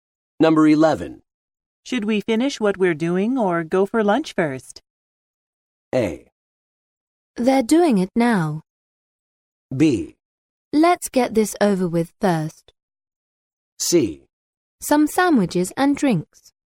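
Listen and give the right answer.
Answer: B: Let's get this over with first.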